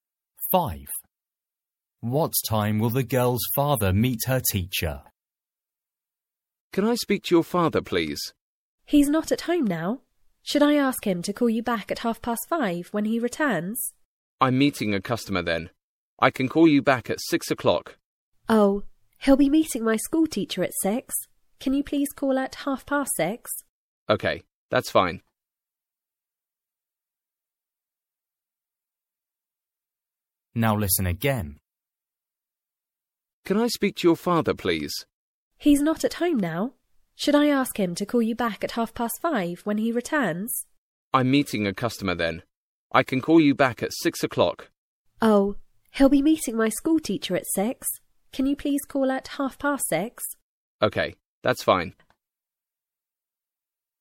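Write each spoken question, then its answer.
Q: What time will the girl's father meet her teacher?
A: 6:00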